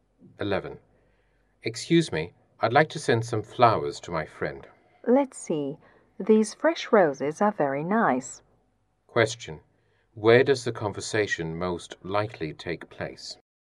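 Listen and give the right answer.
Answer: At a flower shop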